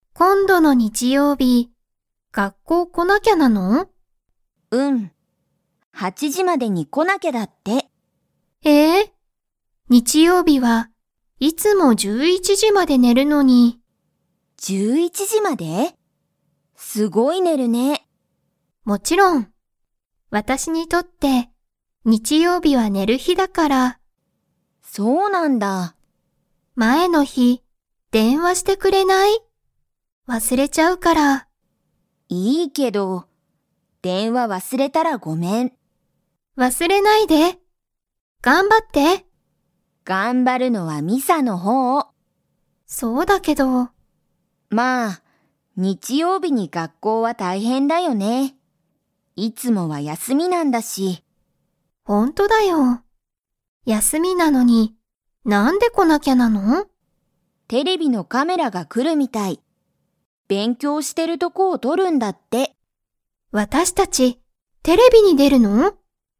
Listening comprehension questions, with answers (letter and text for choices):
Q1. ミサは、毎日(まいにち)11(じゅういち)時(じ)まで寝(ね)ますか?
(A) はい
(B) いいえ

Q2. ミサは、____ユキに電話(でんわ)してほしい。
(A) 今日(きょう)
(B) 日曜日(にちようび)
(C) 前(まえ)の日(ひ)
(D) いつも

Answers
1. (B) いいえ
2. (C) 前(まえ)の日(ひ)

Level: Level 2